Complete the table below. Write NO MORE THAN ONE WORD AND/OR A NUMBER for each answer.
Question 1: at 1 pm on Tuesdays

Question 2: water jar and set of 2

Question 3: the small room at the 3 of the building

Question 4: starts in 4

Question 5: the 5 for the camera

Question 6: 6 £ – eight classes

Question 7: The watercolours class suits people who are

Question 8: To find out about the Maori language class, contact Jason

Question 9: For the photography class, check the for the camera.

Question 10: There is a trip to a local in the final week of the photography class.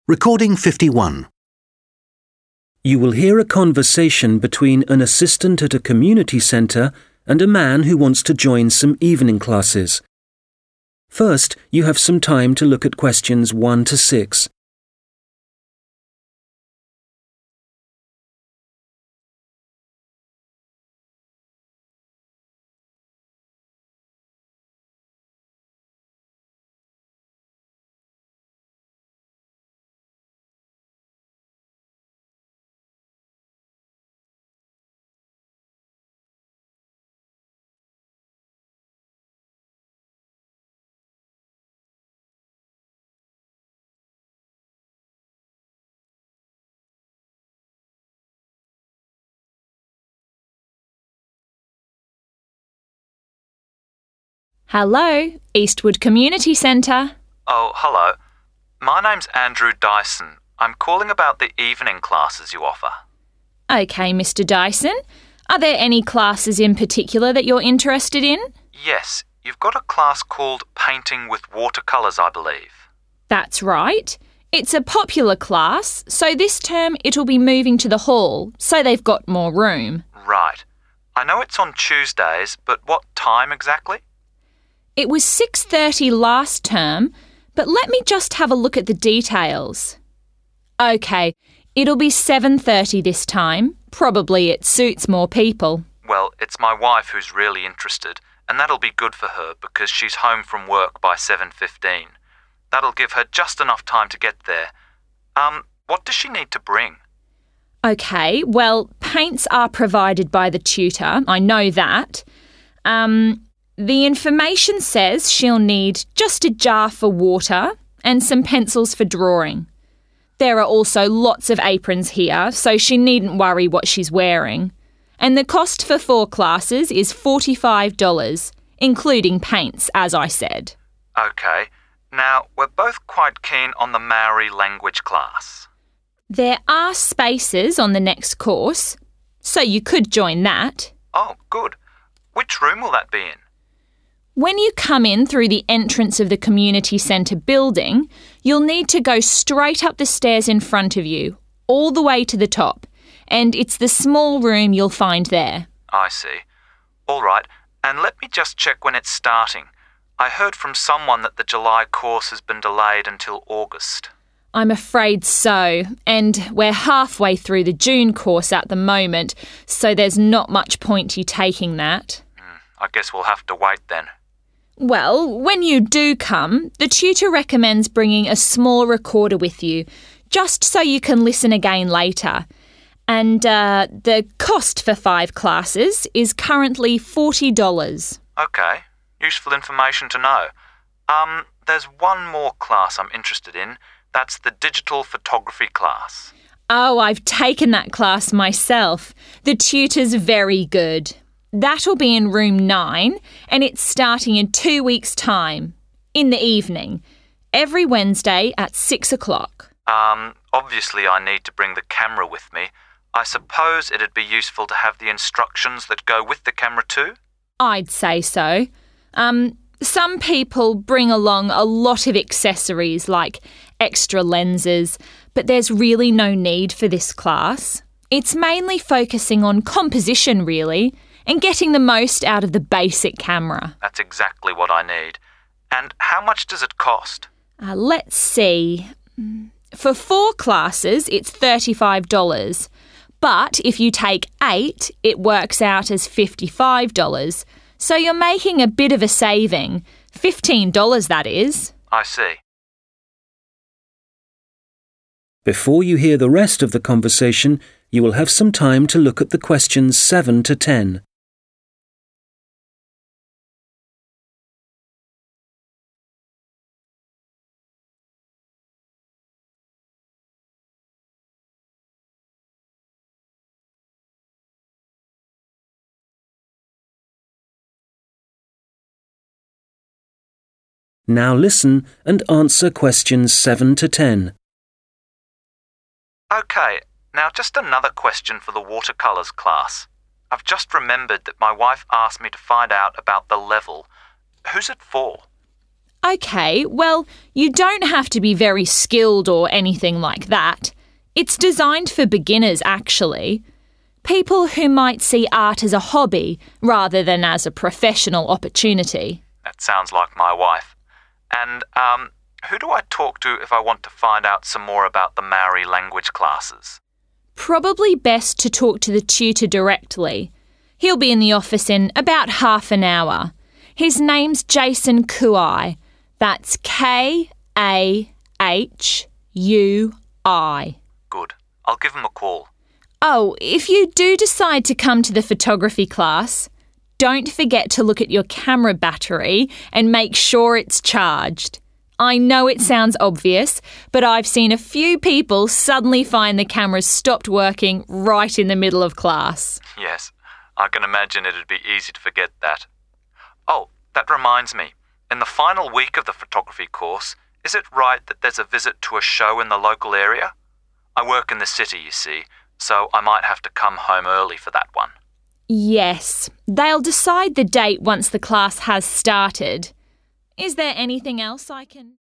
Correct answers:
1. 7.30
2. pencils
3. top
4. August
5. instructions
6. 55
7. beginners
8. Kahui
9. battery
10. show

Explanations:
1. Trước đây bắt đầu lúc 6:30, nhưng kỳ này sẽ đổi thành 7:30 tối để phù hợp với nhiều người hơn.
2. Người phụ nữ nói rõ là người học không cần mang màu vì đã được cung cấp, chỉ cần mang một lọ nước và bút chì (pencils) để vẽ phác thảo.
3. Khi được hỏi lớp Maori học ở đâu, người phụ nữ hướng dẫn: đi lên cầu thang cho tới tầng cao nhất (top) – tức là phòng nhỏ ở trên cùng của tòa nhà.
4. Người đàn ông nghe nói lớp học tháng 7 bị hoãn, và người phụ nữ xác nhận là bị dời sang tháng 8 (August).
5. Người đàn ông cho rằng nên mang theo sách hướng dẫn (instructions) của máy ảnh, và người phụ nữ đồng ý ngay.
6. Học phí lớp chụp ảnh là £35 cho 4 buổi. Nhưng nếu đăng ký 8 buổi thì tổng chi phí là £55 – tiết kiệm được £15.
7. hi được hỏi lớp học dành cho ai, người phụ nữ nói lớp được thiết kế cho người mới bắt đầu – tức là beginners.
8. Khi hỏi liên hệ với ai về lớp Maori, người phụ nữ nói tên giáo viên là Jason Kahui (và còn đánh vần ra).
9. Người phụ nữ dặn hãy kiểm tra pin (battery) máy ảnh và đảm bảo đã sạc đầy để tránh hết pin giữa chừng.
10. Người đàn ông hỏi về một chuyến đi đến một buổi triển lãm (show) ở địa phương trong tuần cuối lớp chụp ảnh, và người phụ nữ xác nhận là đúng.